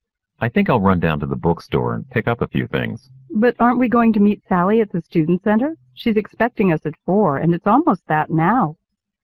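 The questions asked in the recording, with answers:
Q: What does the woman imply?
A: They don't have time to go to the bookstore because they have to meet Sally now.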